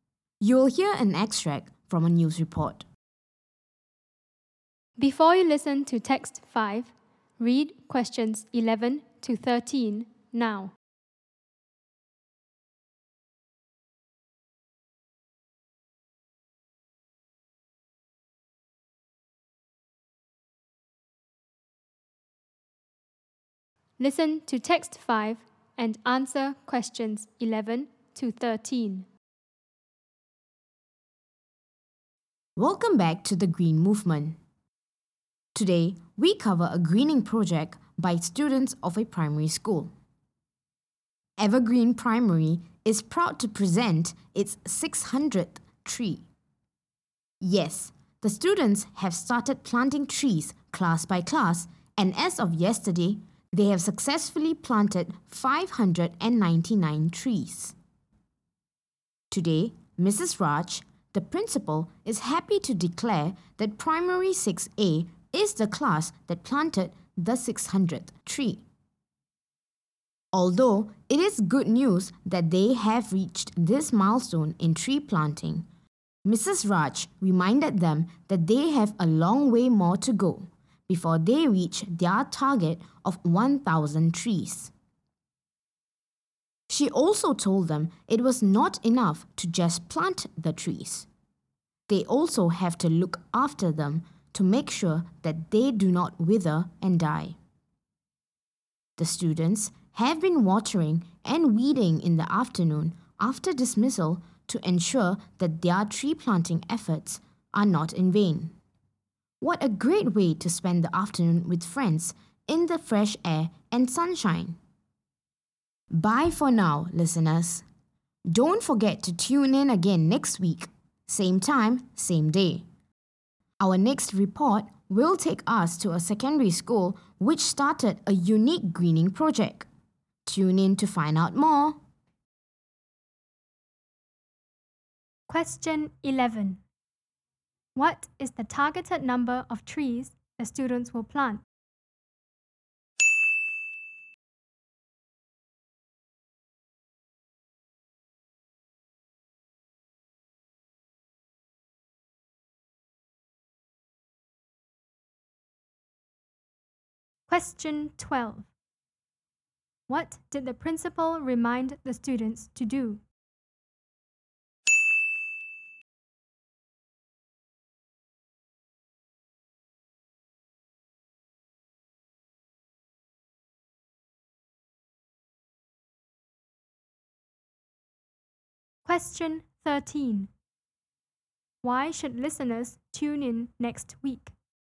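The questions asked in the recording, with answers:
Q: What is the targeted number of trees the students will plant?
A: 1,000 trees

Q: What did the principal remind the students to do?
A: To look after the trees so they do not wither and die

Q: Why should listeners tune in next week?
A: To find out about a secondary school's unique greening project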